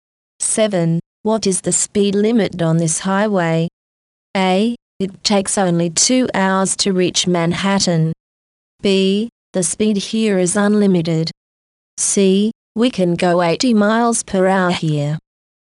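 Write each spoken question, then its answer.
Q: What is the speed limit on this highway?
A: C: We can go 80 miles per hour here.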